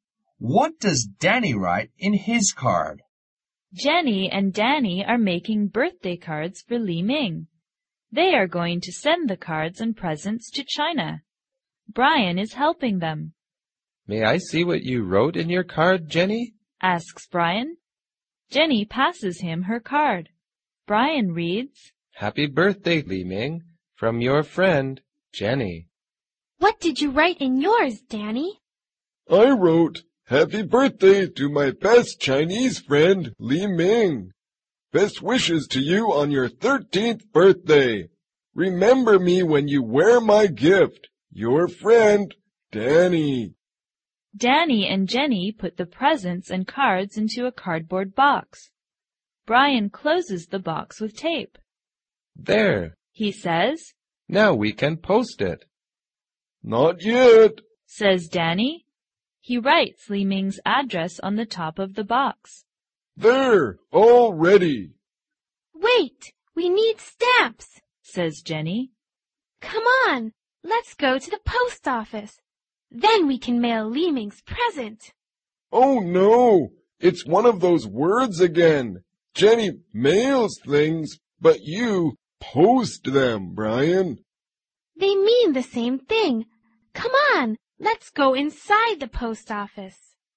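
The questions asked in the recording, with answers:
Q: What does Danny write in his card?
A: Happy birthday to my best Chinese friend, Li Ming. Best wishes to you on your 13th birthday. Remember me when you wear my gift. Your friend, Danny.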